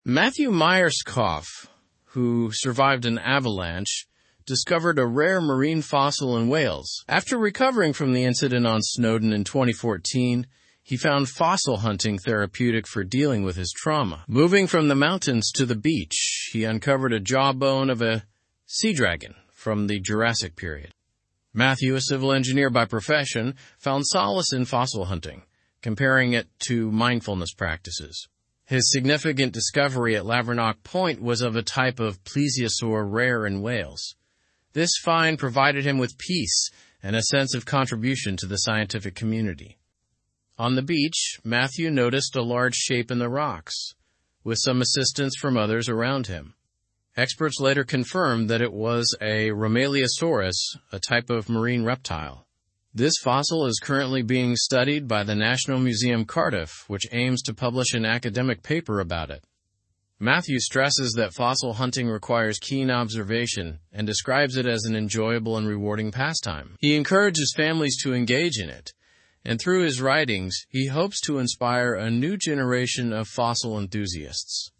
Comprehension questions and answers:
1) What incident did Matthew survive?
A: He survived an avalanche.

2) What activity helped Matthew with his trauma?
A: Fossil hunting helped him with his trauma.

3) Where did Matthew make his significant fossil discovery?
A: He made his discovery at Lavernock Point.

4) What was the fossil identified as?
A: It was identified as a rhomaleosaurus.

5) What does Matthew compare fossil hunting to?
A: He compares it to mindfulness practices.

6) What is Matthew's profession?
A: He is a civil engineer.

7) Where is the fossil being studied?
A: It is being studied at the National Museum Cardiff.

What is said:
Matthew Myerscough, who survived an avalanche, discovered a rare marine fossil in Wales. After recovering from the incident on Snowdon in 2014, he found fossil hunting therapeutic for dealing with his trauma. Moving from the mountains to the beach, he uncovered a jawbone of a 'sea dragon' from the Jurassic period.
Matthew, a civil engineer by profession, found solace in fossil hunting, comparing it to mindfulness practices. His significant discovery at Lavernock Point was of a type of plesiosaur rare in Wales. This find provided him with peace and a sense of contribution to the scientific community.
On the beach, Matthew noticed a large shape in the rocks, with some assistance from others around him. Experts later confirmed that it was a rhomaleosaurus, a type of marine reptile. This fossil is currently being studied by the National Museum Cardiff, which aims to publish an academic paper about it.
Matthew stresses that fossil hunting requires keen observation and describes it as an enjoyable and rewarding pastime. He encourages families to engage in it, and through his writings, he hopes to inspire a new generation of fossil enthusiasts.

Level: Level 3